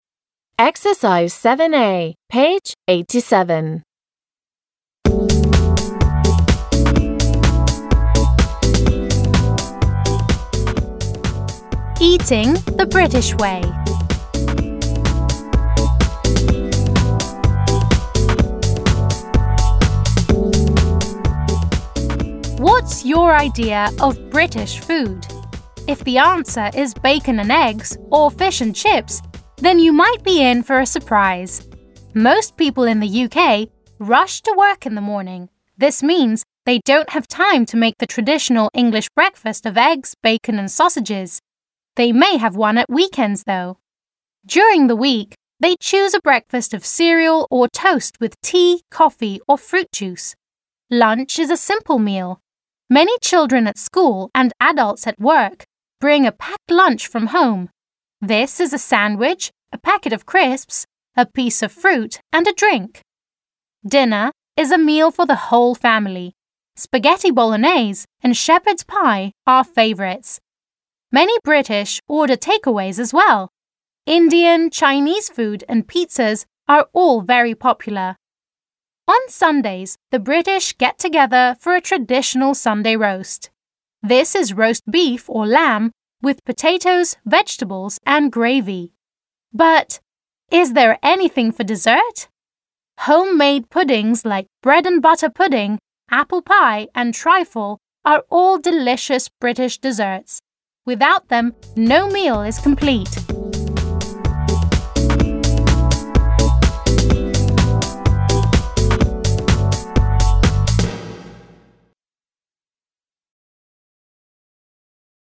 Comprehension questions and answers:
7. a) Which of the following sentences are true about British food? Decide in pairs. Listen and read and check.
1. The British eat a traditional English breakfast every morning.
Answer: F

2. Most British people have a sandwich for lunch.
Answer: T

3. Chinese food is very popular in Britain.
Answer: T

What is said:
Eating the British Way
What's your idea of British food? If the answer is bacon and eggs or fish and chips, then you might be in for a surprise.
Most people in the UK rush to work in the morning. This means they don't have time to make the traditional English breakfast of egg, bacon and sausages. They may have one at weekends though. During the week, they choose a breakfast of cereal or toast with tea, coffee or fruit juice. Lunch is a simple meal. Many children at school and adults at work bring a 'packed lunch' from home. This is a sandwich, a packet of crisps, a piece of fruit and a drink. Dinner is a meal for the whole family. Spaghetti bolognaise and shepherd's pie are favourites. Many British order takeaways as well! Indian, Chinese food and pizzas are all very popular.
On Sundays, the British get together for a traditional Sunday roast. This is roast beef or lamb with potatoes, vegetables and gravy.
But... is there anything for dessert? Homemade puddings like bread and butter pudding, apple pie and trifle are all delicious British desserts. Without them no meal is complete!

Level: 6 класс